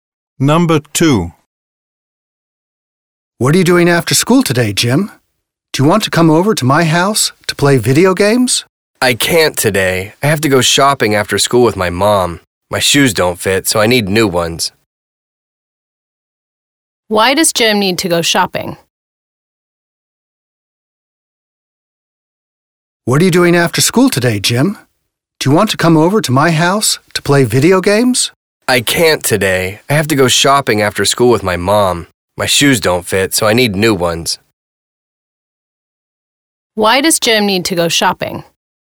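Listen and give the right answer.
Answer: His shoes don't fit, so he needs new ones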